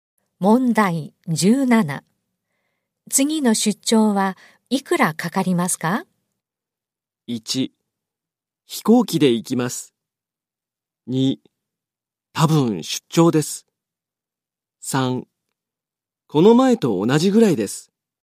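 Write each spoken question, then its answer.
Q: 次の出張はいくらかかりますか?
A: 3: この前と同じぐらいです。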